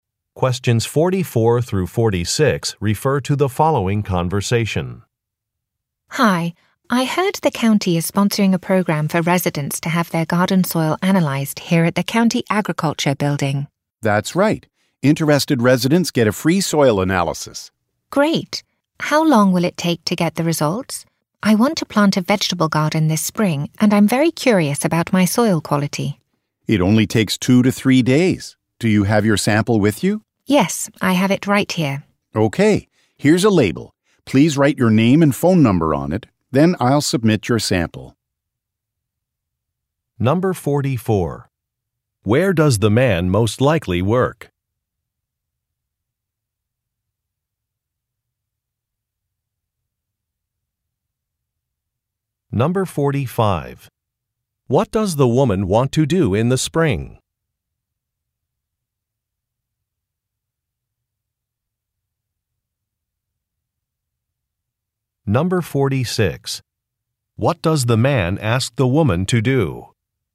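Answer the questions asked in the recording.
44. At the County Agriculture Building
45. Plant a vegetable garden
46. Write her name and phone number on a label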